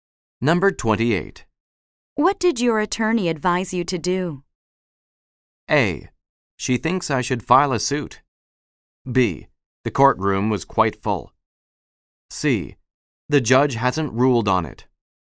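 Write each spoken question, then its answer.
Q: What did your attorney advise you to do?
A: A: She thinks I should file a suit.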